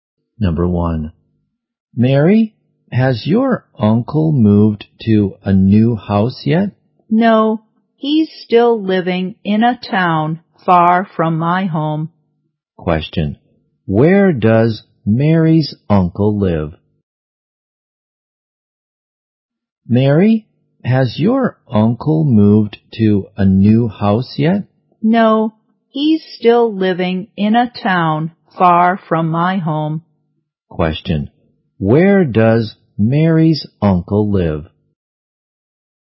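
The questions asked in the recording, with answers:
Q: Question, where does Mary's uncle live?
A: In a town far from Mary's home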